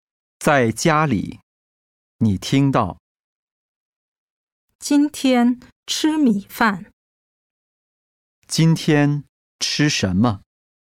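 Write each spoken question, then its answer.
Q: 今天吃什么?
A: 米饭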